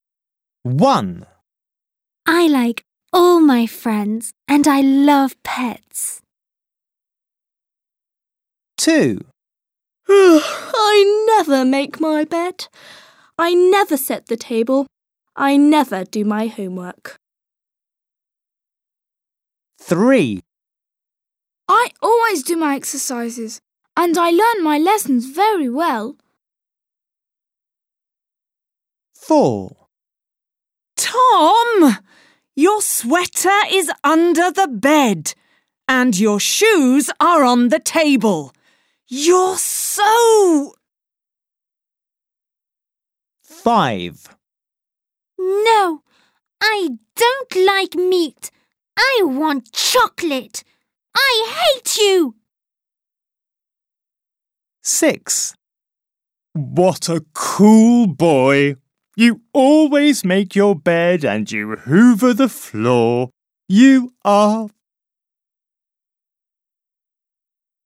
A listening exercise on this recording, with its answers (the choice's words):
3. Copy the sentences, listen, and choose the right adjective.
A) tidy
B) messy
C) hard-working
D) lazy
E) nice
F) terrible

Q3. He's ..................................................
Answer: hard-working

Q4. You're so ........................................ !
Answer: messy

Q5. She's ................................................. !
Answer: terrible

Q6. You're ............................................... !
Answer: tidy